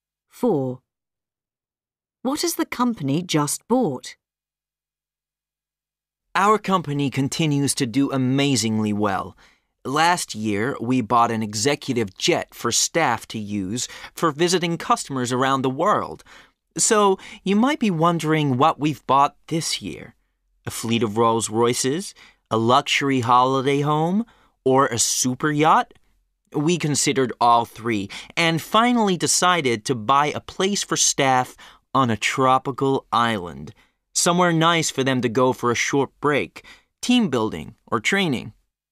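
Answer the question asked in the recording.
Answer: A place on a tropical island for staff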